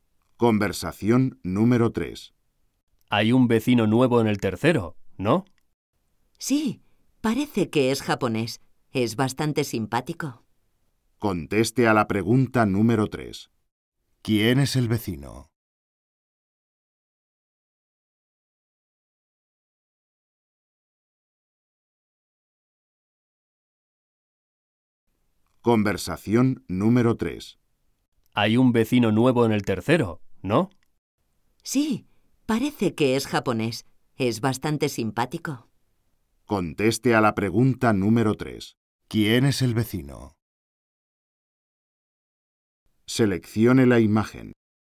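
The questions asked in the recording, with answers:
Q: ¿Quién es el vecino?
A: Un japonés simpático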